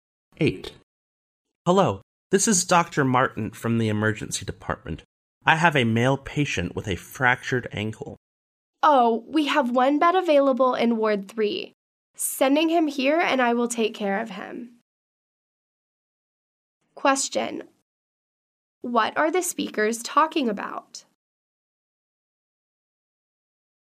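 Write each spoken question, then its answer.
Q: What are the speakers talking about?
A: Finding a hospital bed for a patient with a broken ankle.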